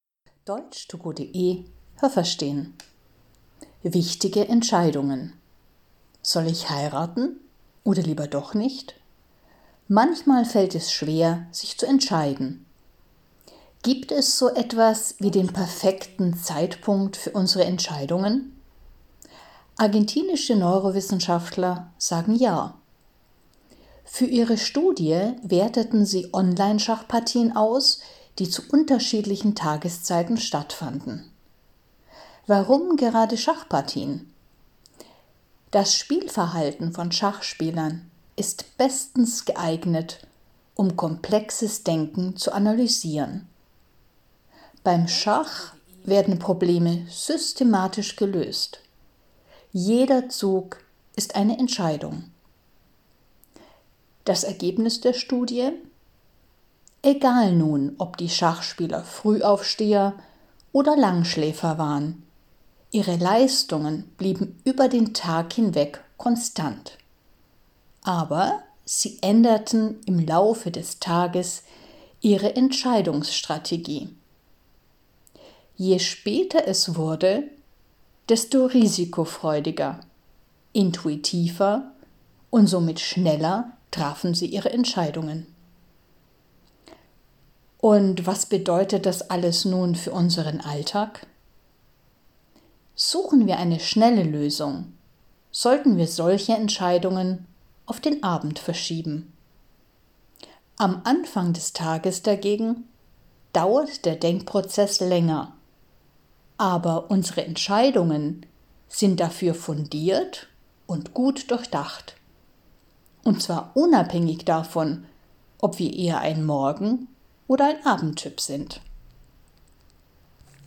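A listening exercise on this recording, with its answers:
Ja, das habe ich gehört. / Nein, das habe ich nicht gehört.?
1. Ein Forschungsteam aus dem Bereich der Neurowissenschaften behauptet, dass es für Entscheidungen einen günstigen Zeitpunkt gibt.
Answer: Ja, das habe ich gehört.

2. Für die Studie analysierte man Schachpartien im Internet, die an verschiedenen Tagen um die gleiche Uhrzeit stattfanden.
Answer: Nein, das habe ich nicht gehört.

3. Beim Schachspielen muss man viele Entscheidungen fällen und strategisch denken.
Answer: Ja, das habe ich gehört.

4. Bei der Studie zeigten sich deutliche Unterschiede zwischen Frühaufstehern und Langschläfern.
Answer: Nein, das habe ich nicht gehört.

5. Die Leistungen der Schachspieler blieben im Laufe des Tages konstant, aber je später es wurde, desto intuitiver spielten sie.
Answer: Ja, das habe ich gehört.

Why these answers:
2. Die Schachpartien fanden zu unterschiedlichen Tageszeiten statt, also zum Beispiel morgens, mittags, abends.
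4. Die Ergebnisse waren für Frühaufsteher und Langschläfer gleich.

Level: C1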